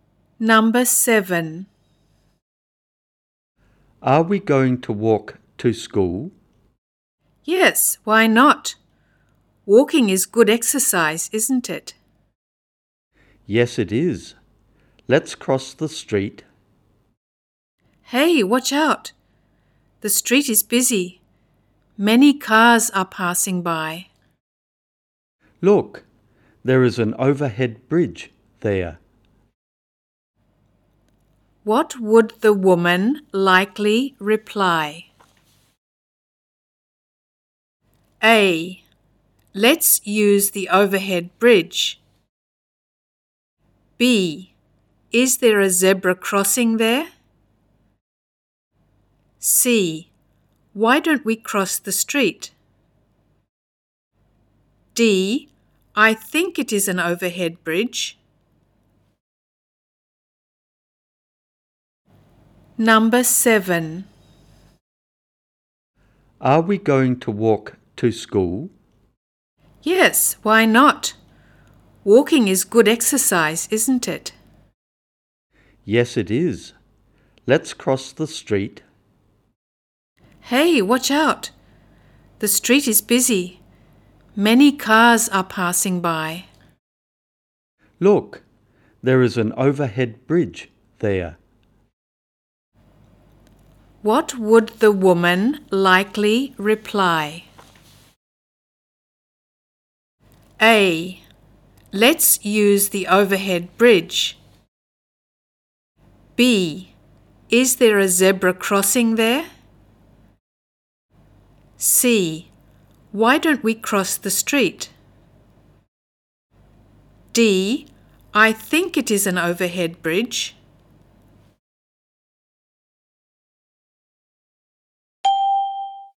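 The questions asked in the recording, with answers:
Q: What would the woman likely reply?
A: A: Let's use the overhead bridge.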